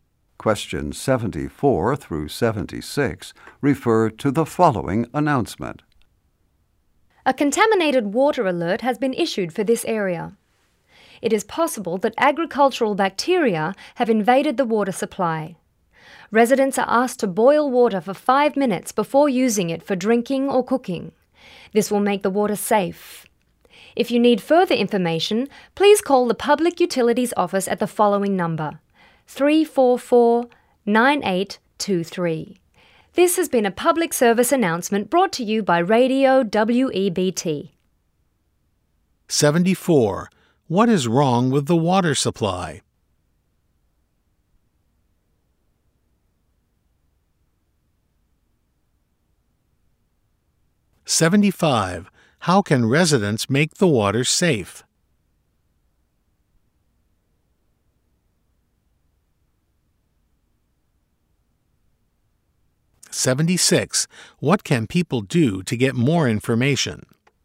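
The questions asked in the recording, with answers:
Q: What is wrong with the water supply?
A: It may be contaminated with agricultural bacteria

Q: How can residents make the water safe?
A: Boil it for 5 minutes

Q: What can people do to get more information?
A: Call the Public Utilities Office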